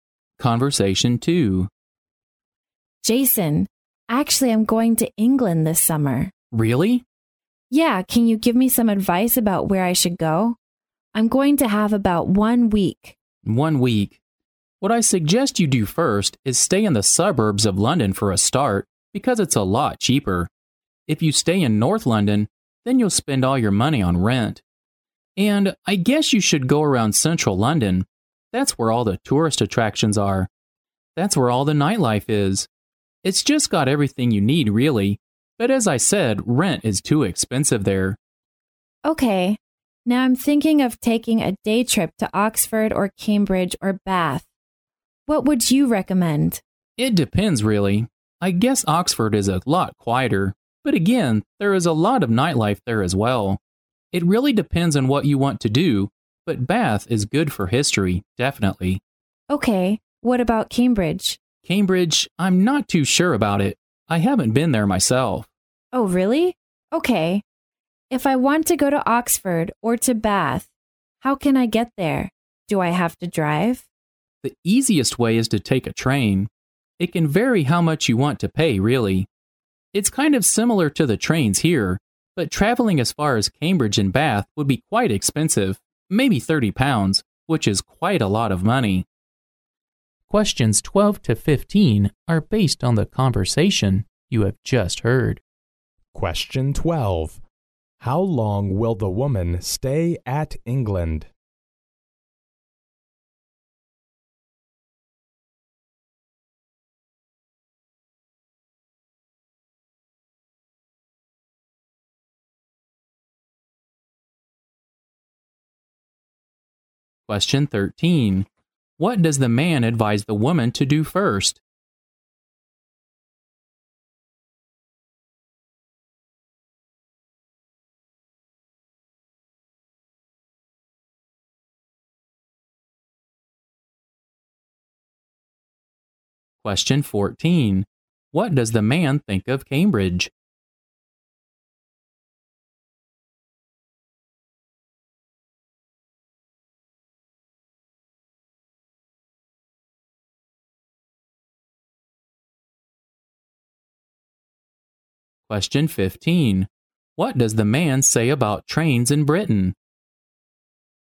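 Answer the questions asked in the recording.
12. About one week
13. Stay in the suburbs of London because it's cheaper
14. He isn't sure about it; he hasn't been there
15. They're the easiest way to travel but can be expensive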